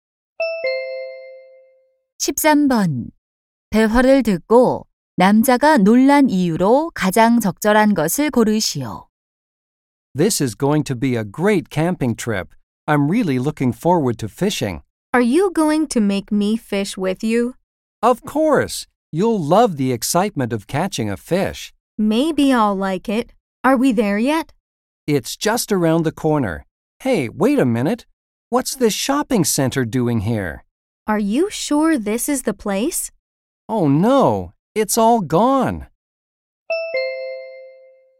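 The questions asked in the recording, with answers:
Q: 대화를 듣고 남자가 놀란 이유로 가장 적절한 것을 고르시오.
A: 낚시할 곳이 사라지고 쇼핑센터가 생겨서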